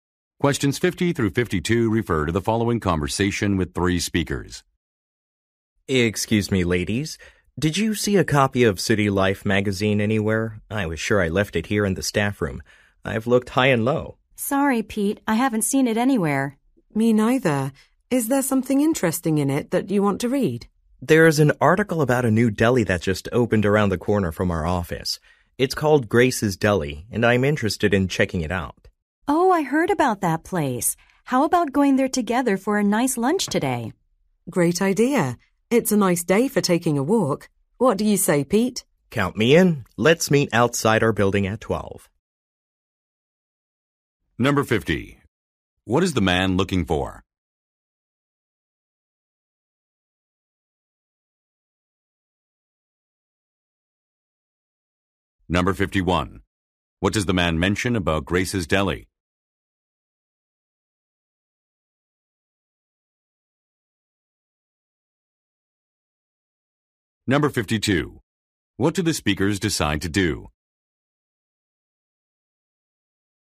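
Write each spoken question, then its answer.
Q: What is the man looking for?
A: A copy of City Life magazine

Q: What does the man mention about Grace's Deli?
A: It just opened near their office

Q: What do the speakers decide to do?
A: Have lunch together at the deli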